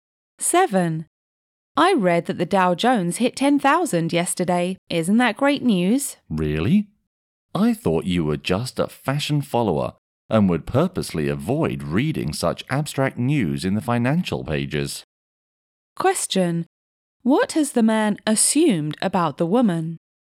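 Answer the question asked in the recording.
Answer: She is a fashion follower who avoids financial news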